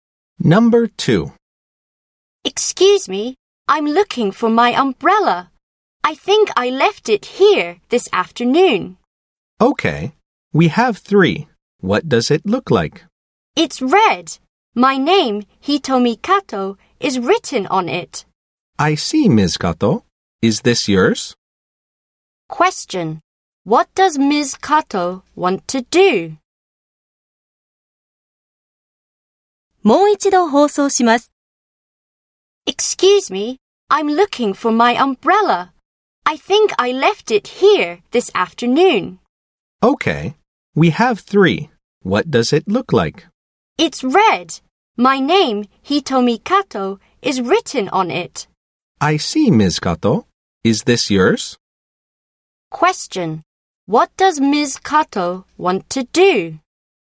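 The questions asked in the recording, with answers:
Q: What does Ms. Kato want to do?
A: Find her red umbrella that she left there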